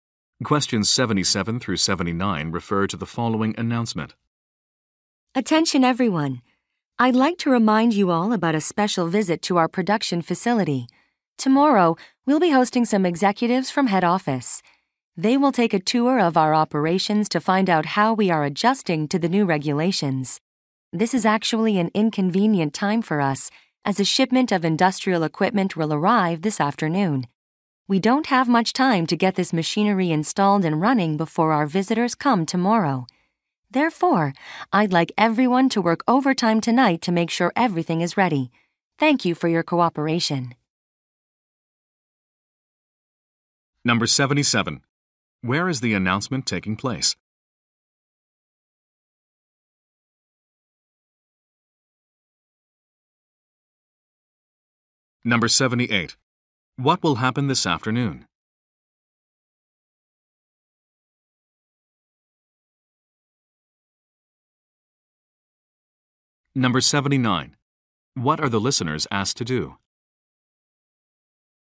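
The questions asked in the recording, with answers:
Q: Where is the announcement taking place?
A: At a production facility

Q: What will happen this afternoon?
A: A shipment of equipment will arrive

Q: What are the listeners asked to do?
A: Work overtime tonight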